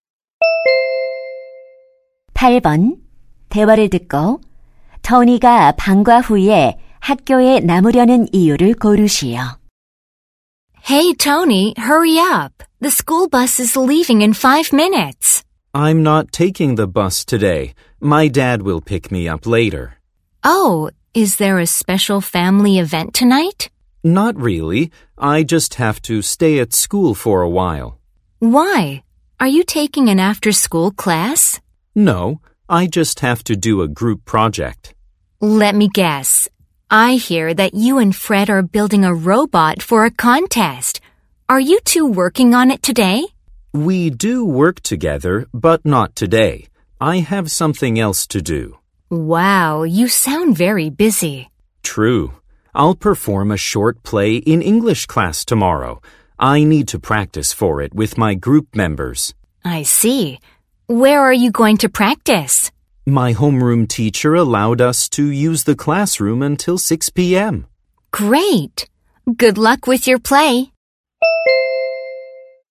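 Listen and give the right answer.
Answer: 영어 수업 연극 연습을 하려고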